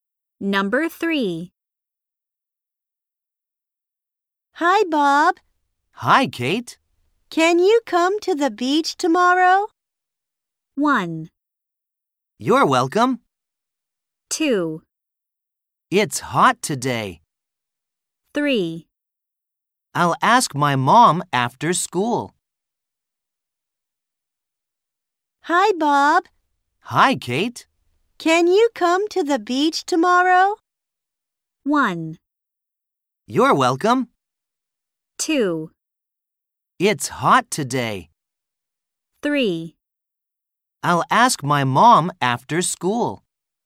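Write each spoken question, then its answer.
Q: Can you come to the beach tomorrow?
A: 3: I'll ask my mom after school.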